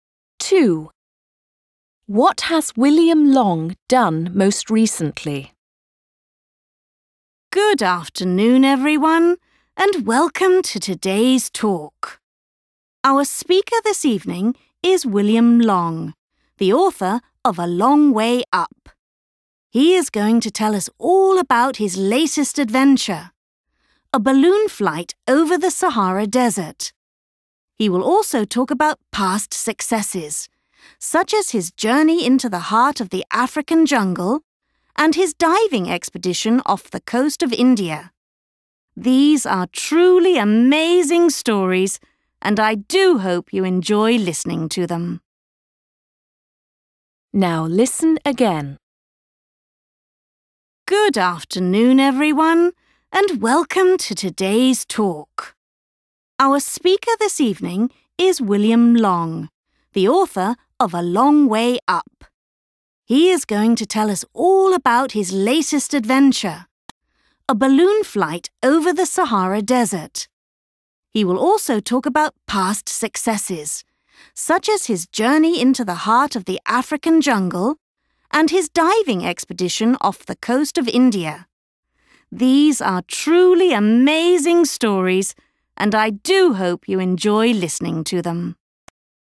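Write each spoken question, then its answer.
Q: What has William Long done most recently?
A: A balloon flight over the Sahara Desert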